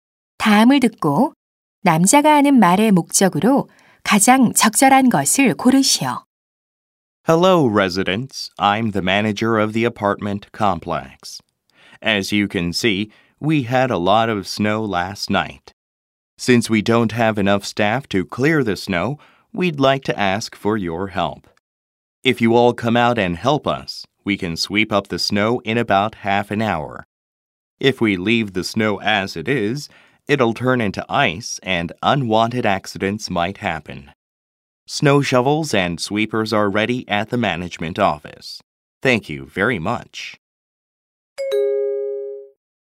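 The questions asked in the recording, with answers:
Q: 다음을 듣고 남자가 하는 말의 목적으로 가장 적절한 것을 고르시오.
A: 주민들에게 눈 치우기를 도와 달라고 요청하려고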